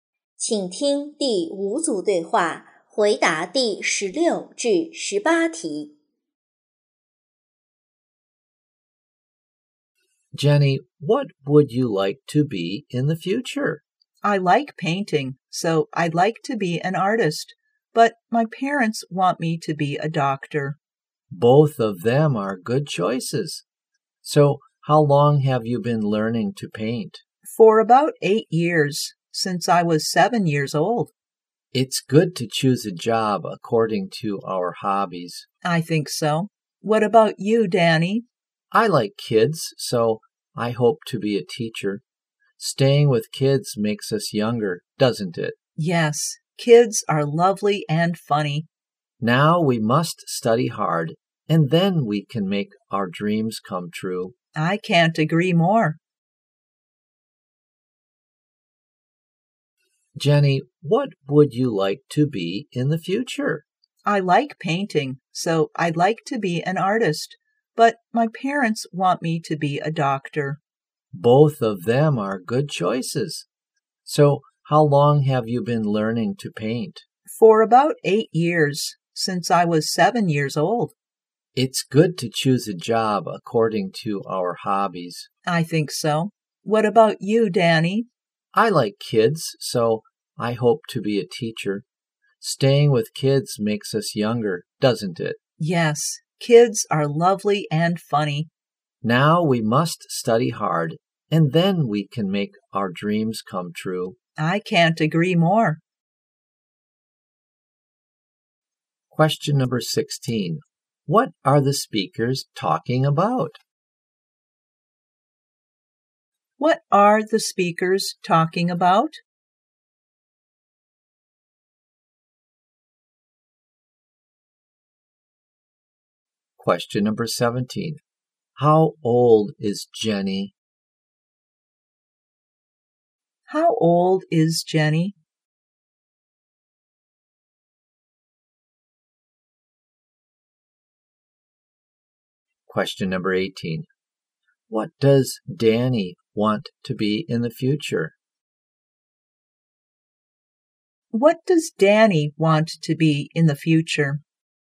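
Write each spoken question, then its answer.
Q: What are the speakers talking about?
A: Their future jobs

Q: How old is Jenny?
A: 15 years old

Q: What does Danny want to be in the future?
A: A teacher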